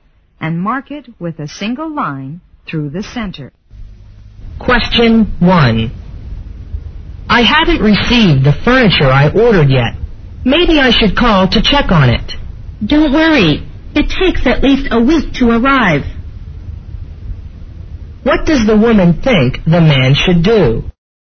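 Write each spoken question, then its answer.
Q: What does the woman think the man should do?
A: Wait; the furniture takes at least a week to arrive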